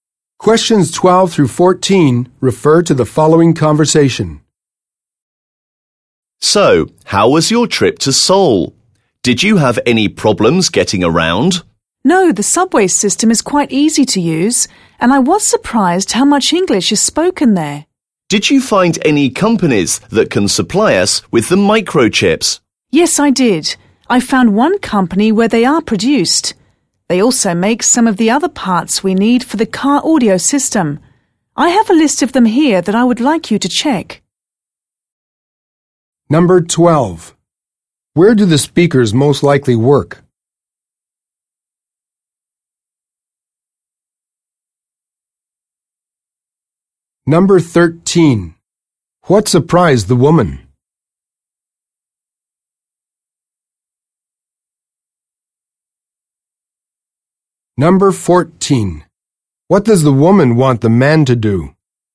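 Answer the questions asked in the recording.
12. At a company making car audio systems
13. How much English is spoken in Seoul
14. Check a list of parts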